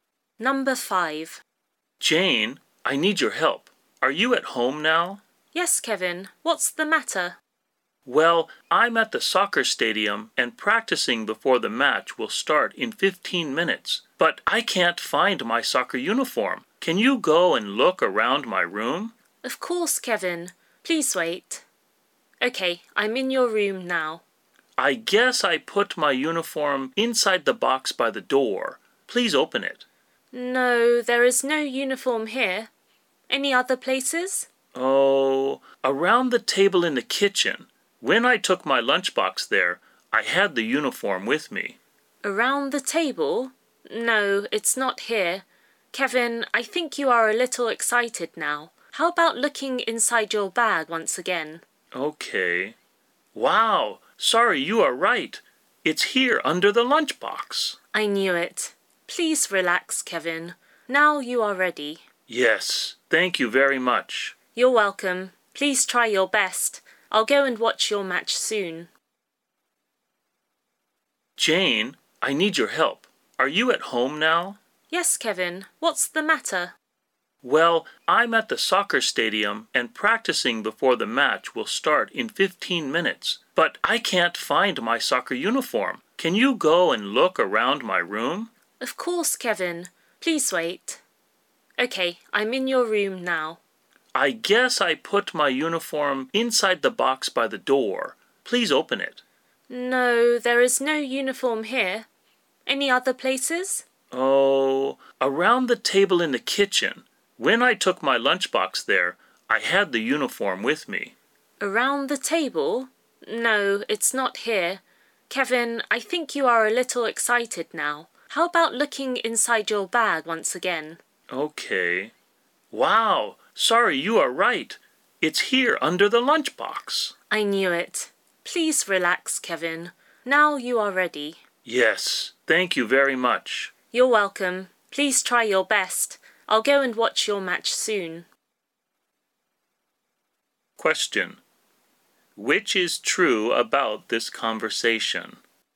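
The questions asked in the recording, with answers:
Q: Which is true about this conversation?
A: Kevin's uniform was in his bag under the lunchbox.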